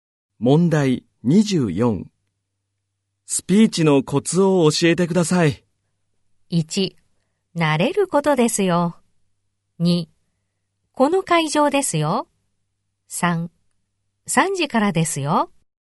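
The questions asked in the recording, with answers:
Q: スピーチのコツを教えてください。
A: 1: 慣れることですよ。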